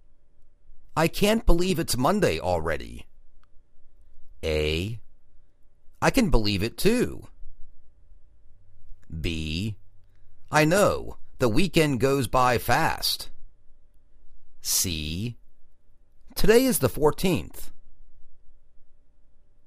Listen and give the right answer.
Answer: I know, the weekend goes by fast